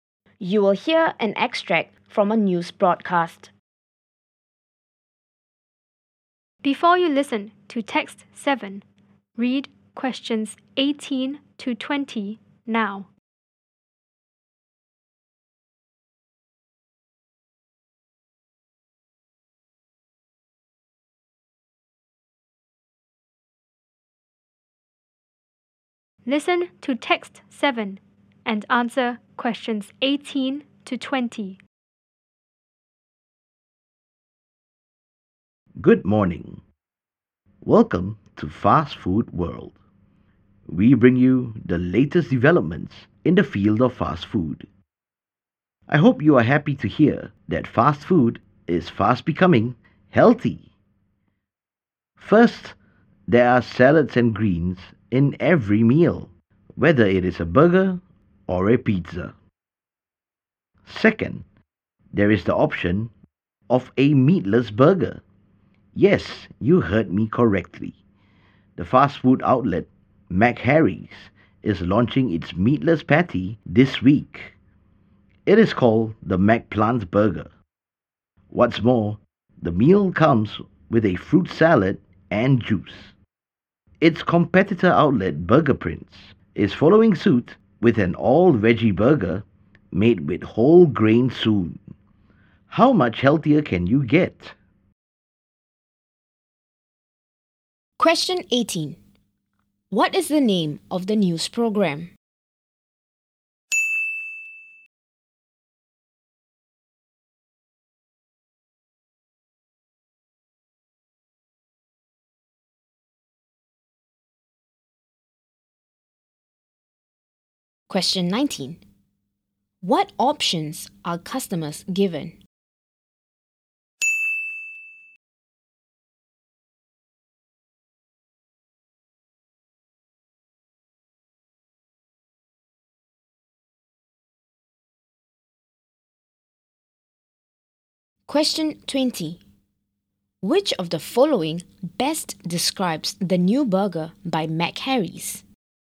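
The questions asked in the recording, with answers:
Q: What is the name of the news program?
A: Fast Food World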